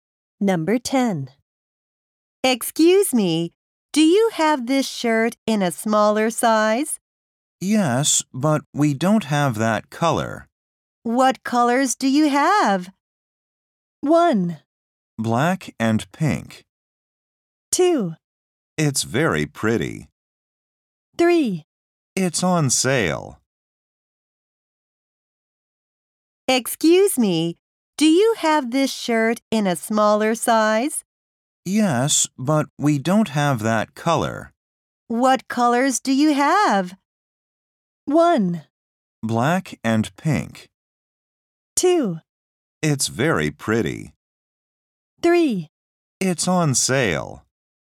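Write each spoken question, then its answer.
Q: What colors do you have?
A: 1: Black and pink.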